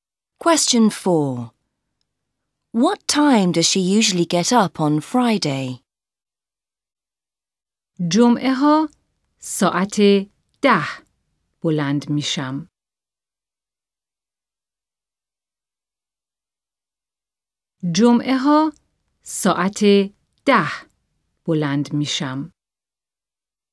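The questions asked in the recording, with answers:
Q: What time does she usually get up on Friday?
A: At 10 o'clock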